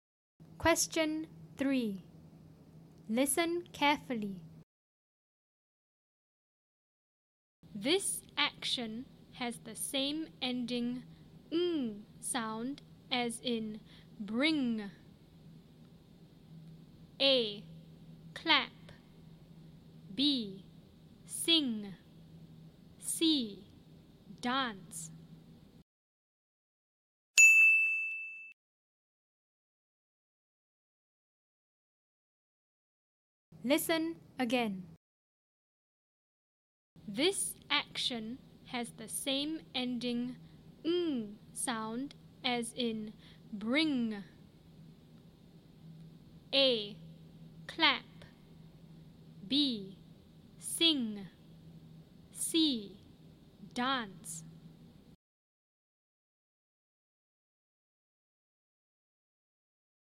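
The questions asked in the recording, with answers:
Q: This action has the same ending ng sound as in bring.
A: B: Sing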